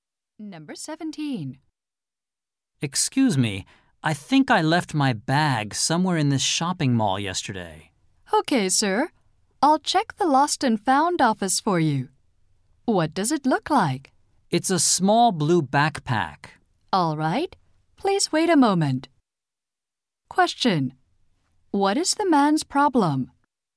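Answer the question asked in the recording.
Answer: He lost his bag.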